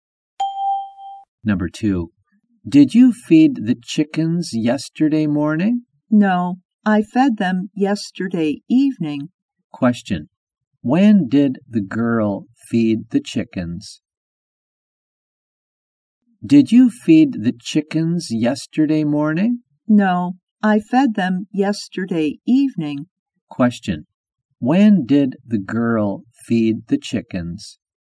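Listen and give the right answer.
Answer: Yesterday evening.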